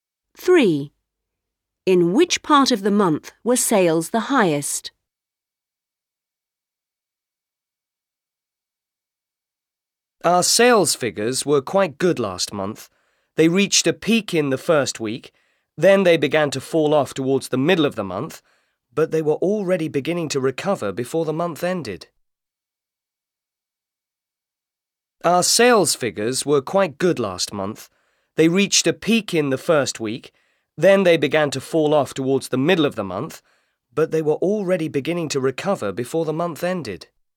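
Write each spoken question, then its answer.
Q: In which part of the month were sales the highest?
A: In the first week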